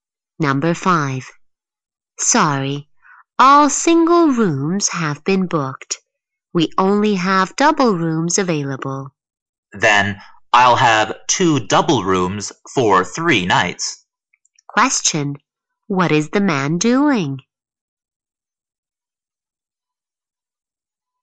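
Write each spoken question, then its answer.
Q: Question, what is the man doing?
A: Booking hotel rooms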